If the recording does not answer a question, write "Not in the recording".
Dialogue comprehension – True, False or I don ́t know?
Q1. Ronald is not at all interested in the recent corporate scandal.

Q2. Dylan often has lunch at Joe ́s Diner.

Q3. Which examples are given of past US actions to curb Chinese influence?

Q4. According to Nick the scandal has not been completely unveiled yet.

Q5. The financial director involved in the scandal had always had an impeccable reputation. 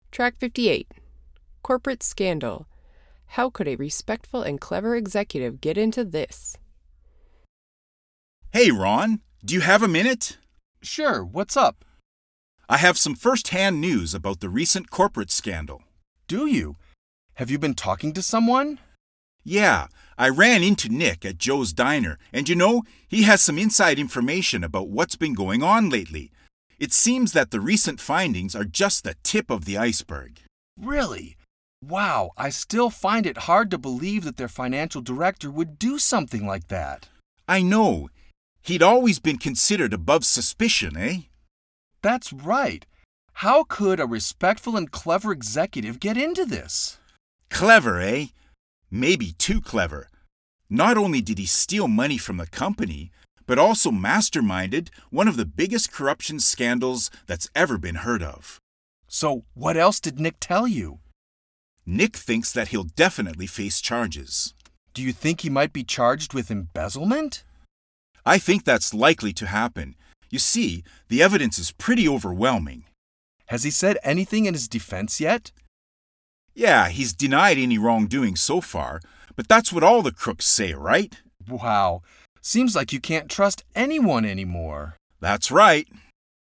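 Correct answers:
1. False
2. I don ́t know
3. Not in the recording
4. True
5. True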